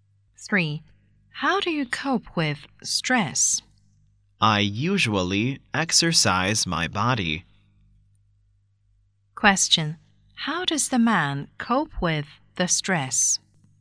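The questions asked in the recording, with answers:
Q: How does the man cope with the stress?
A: He exercises his body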